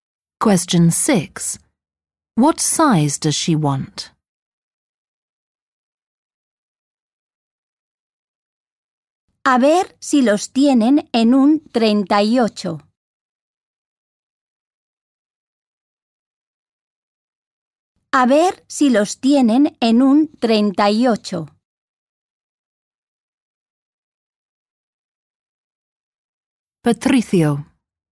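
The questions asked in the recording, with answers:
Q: What size does she want?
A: Size 38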